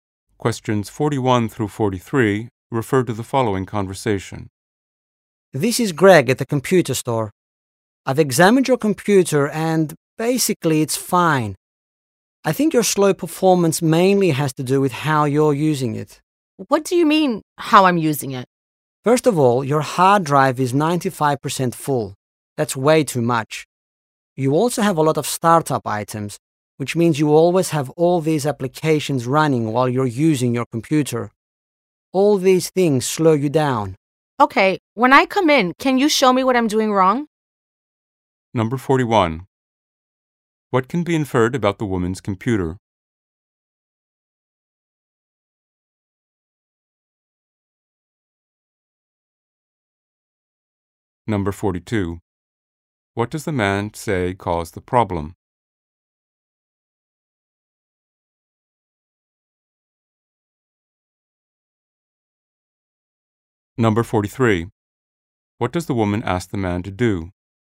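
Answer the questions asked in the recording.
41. It is running slowly
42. A full hard drive and too many startup items
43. Show her what she is doing wrong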